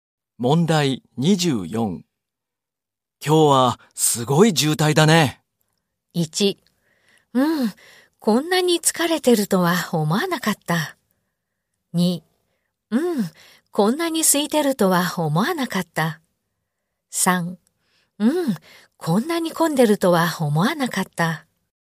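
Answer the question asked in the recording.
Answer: 3: うん、こんなに混んでるとは思わなかった。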